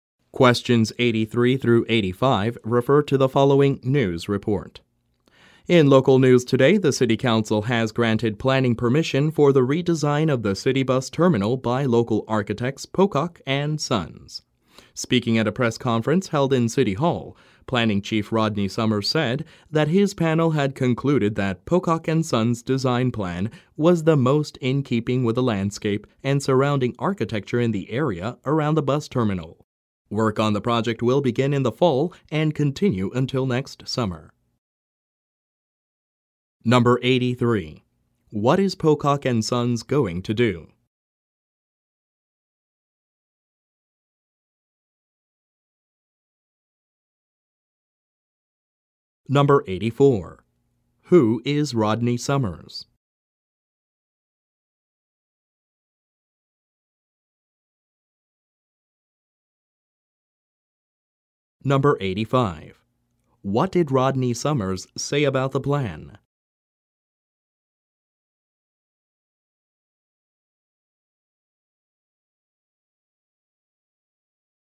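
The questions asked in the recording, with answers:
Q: What is Pocock and Sons going to do?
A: Redesign the city bus terminal

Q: Who is Rodney Summers?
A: The city's Planning Chief

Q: What did Rodney Summers say about the plan?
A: It fit best with the landscape and surrounding architecture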